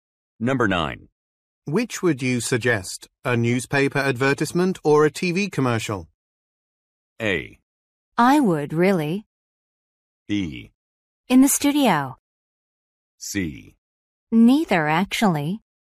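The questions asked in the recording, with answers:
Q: Which would you suggest, a newspaper advertisement or a TV commercial?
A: C: Neither, actually.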